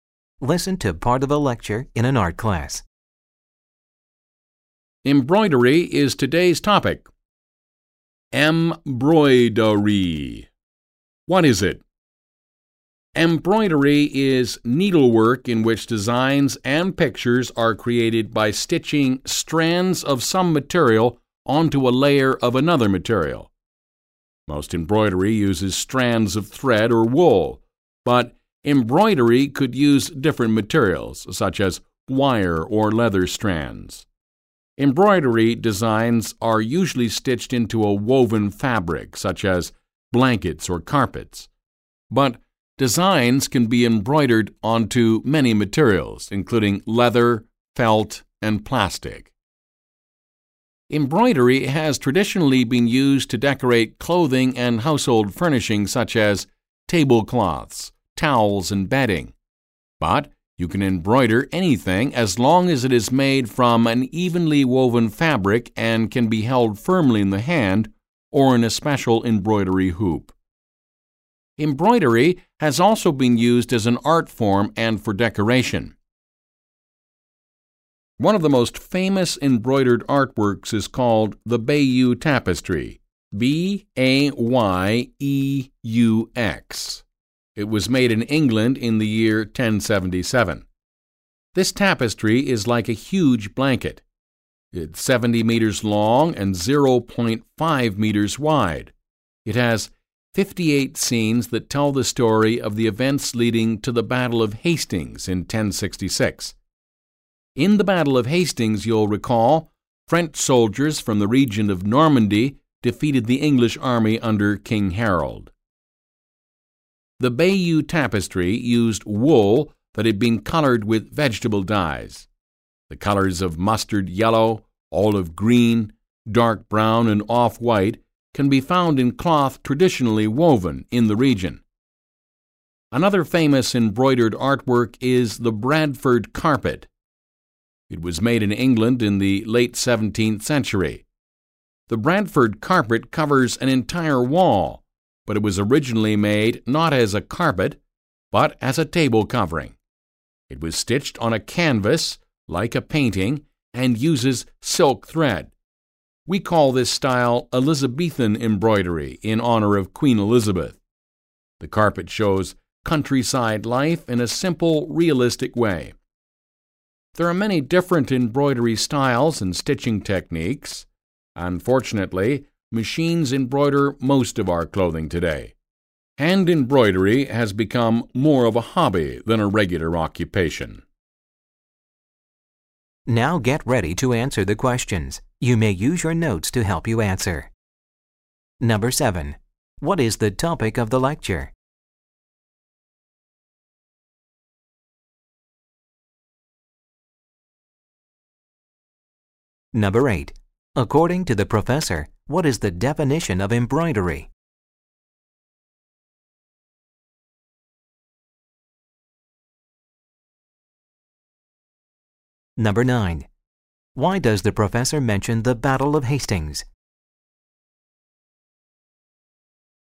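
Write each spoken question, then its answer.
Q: What is the topic of the lecture?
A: Embroidery

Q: According to the professor, what is the definition of embroidery?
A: Needlework in which designs and pictures are created by stitching strands of some material onto a layer of another material

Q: Why does the professor mention the Battle of Hastings?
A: To explain the story shown in the Bayeux Tapestry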